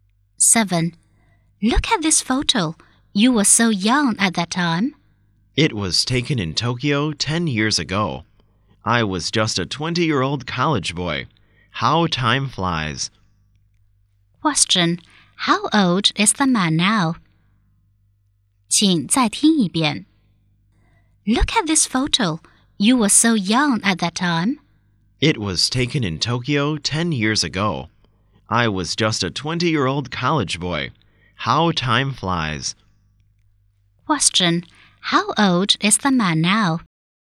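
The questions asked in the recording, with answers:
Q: Question. How old is the man now?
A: 30 years old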